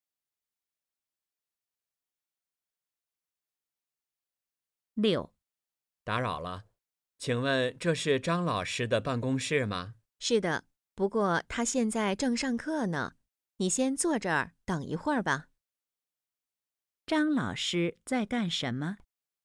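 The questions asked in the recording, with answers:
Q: 张老师在干什么?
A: 上课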